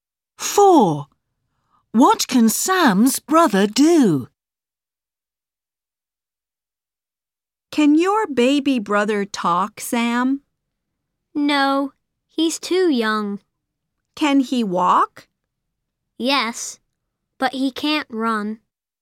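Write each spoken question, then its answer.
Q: What can Sam's brother do?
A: walk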